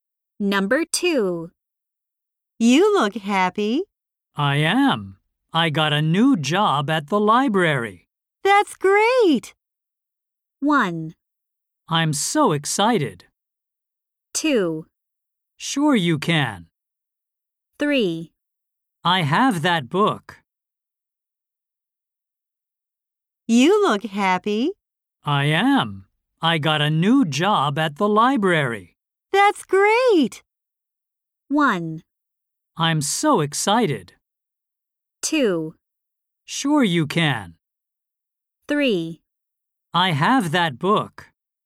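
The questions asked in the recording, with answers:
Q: That's great.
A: 1: I'm so excited.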